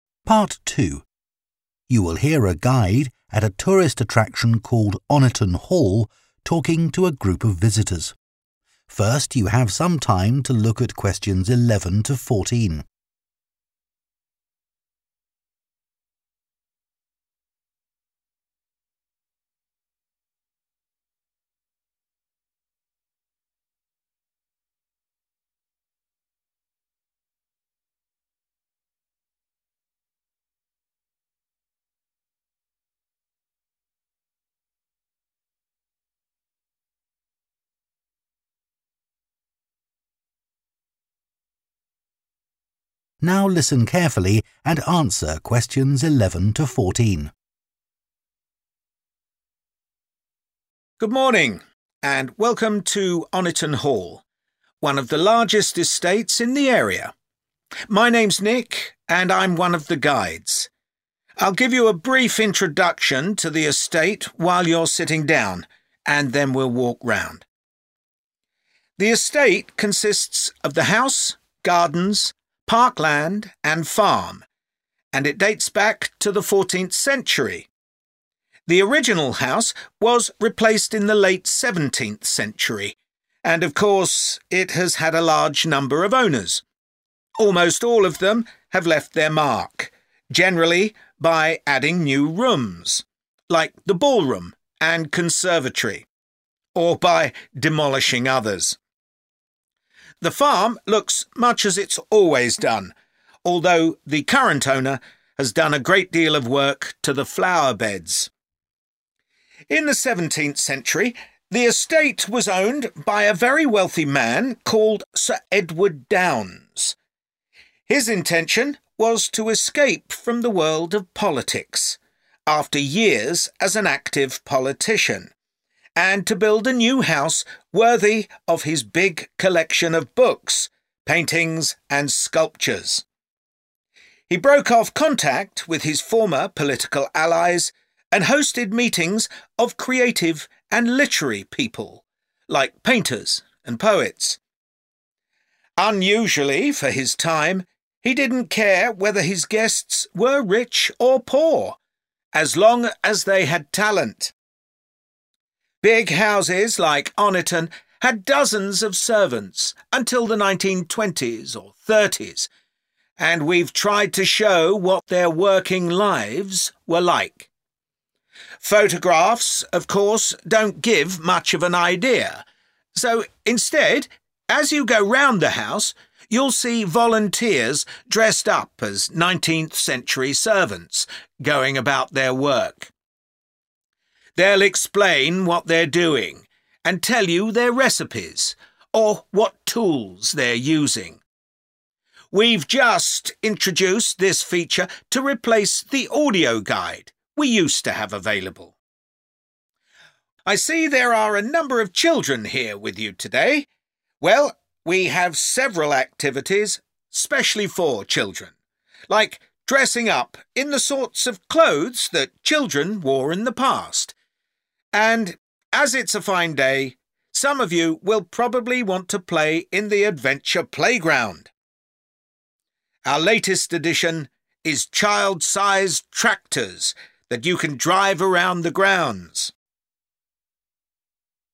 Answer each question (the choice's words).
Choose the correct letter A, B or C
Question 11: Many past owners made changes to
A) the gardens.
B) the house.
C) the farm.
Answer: the house.

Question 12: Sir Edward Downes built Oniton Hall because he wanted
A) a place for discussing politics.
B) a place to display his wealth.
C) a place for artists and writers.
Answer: a place for artists and writers.

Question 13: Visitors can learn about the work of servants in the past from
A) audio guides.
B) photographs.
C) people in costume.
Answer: people in costume.

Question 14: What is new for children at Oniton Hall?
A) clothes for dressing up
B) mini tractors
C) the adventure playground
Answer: mini tractors

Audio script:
"The original house was replaced in the late seventeenth century, and of course it has had a large number of owners. Almost all of them have left their mark, generally by adding new rooms, like the ballroom and conservatory, or by demolishing others."
"In the seventeenth century, the estate was owned by a very wealthy man called Sir Edward Downes. His intention was to escape from the world of politics, after years as an active politician, and to build a new house worthy of his big collection of books, paintings, and sculptures. He broke off contact with his former political allies and hosted meetings of creative and literary people, like painters and poets. Unusually for his time, he didn't care whether his guests were rich or poor, as long as they had talent."
"Photographs of course don't give much of an idea, so instead, as you go around the house, you'll see volunteers dressed up as nineteenth-century servants, going about their work. They'll explain what they're doing, and tell you their recipes or what tools they're using. We've just introduced this feature to replace the audio guide we used to have available."
"Well, we have several activities specially for children, like dressing up in the sorts of clothes that children wore in the past, and as it's a fine day, some of you will probably want to play in the adventure playground. Our latest addition is child-sized tractors, that you can drive around the grounds."